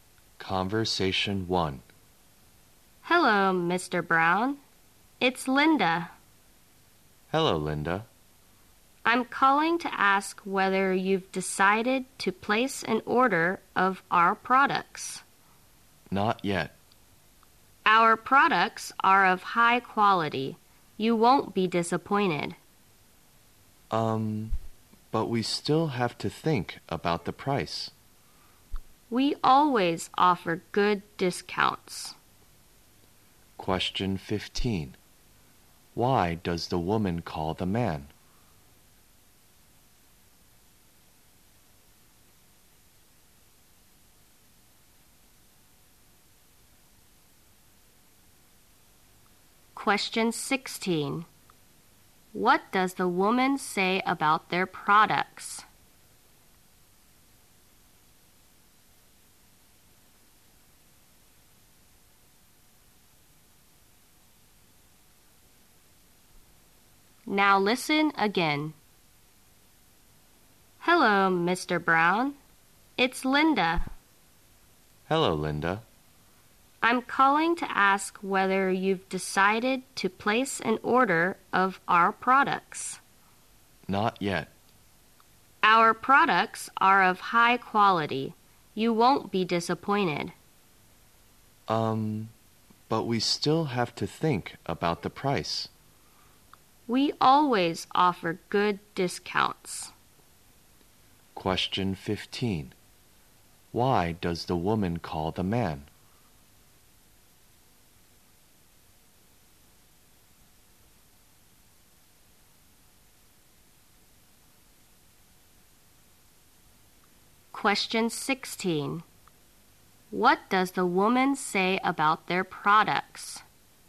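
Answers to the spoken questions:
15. To ask whether he has decided to place an order of their products
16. They are of high quality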